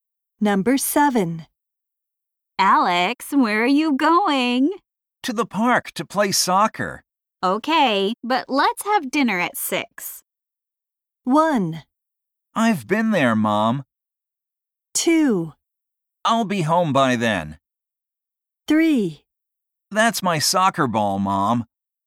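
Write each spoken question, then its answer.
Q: Okay, but let's have dinner at 6.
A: 2: I'll be home by then.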